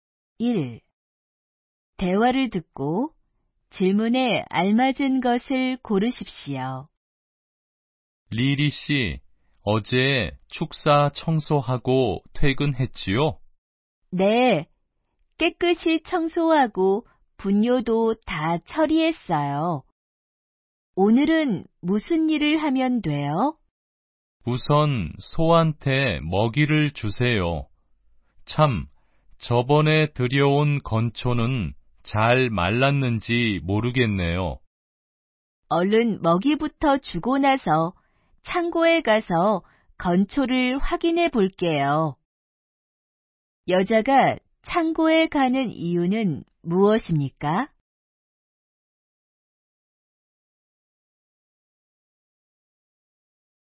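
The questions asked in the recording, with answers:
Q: 여자가 창고에 가는 이유는 무엇입니까?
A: 건초가 잘 말랐는지 확인하려고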